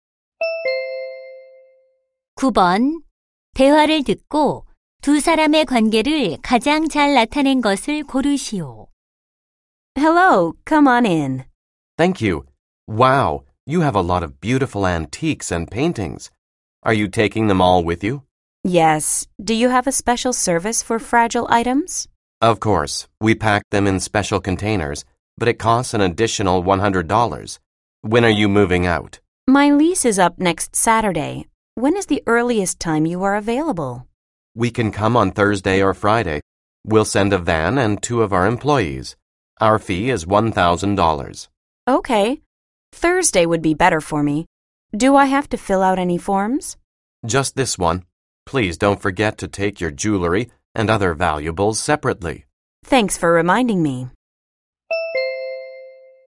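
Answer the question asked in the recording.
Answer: 이삿짐센터 직원 - 고객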